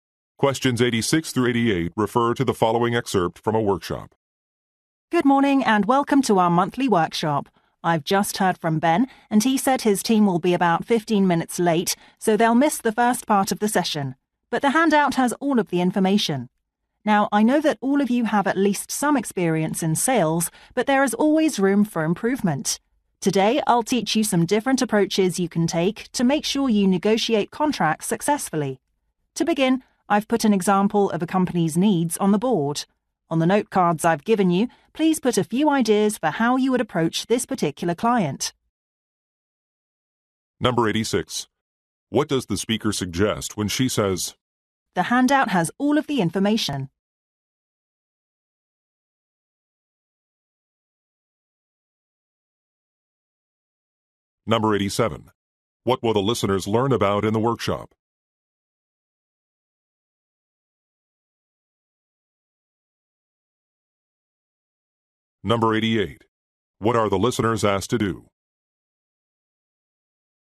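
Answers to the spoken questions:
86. Ben's team can catch up on what they miss
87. Negotiating contracts
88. Write ideas on note cards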